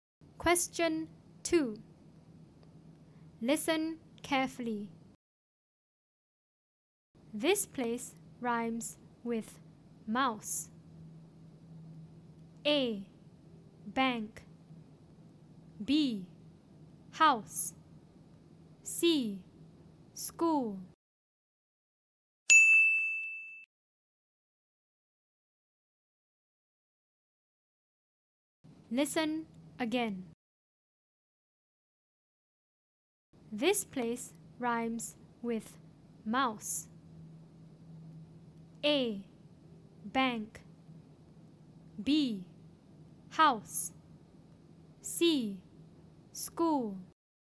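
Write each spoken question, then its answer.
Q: This place rhymes with mouse.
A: B: House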